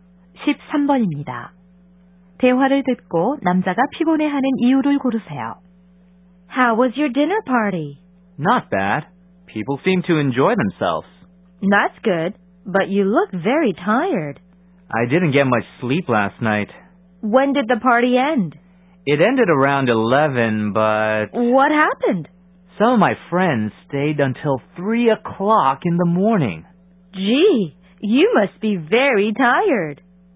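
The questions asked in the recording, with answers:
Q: 대화를 듣고 남자가 피곤해하는 이유를 고르세요.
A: 친구들이 새벽 3시까지 머물러 잠을 거의 못 자서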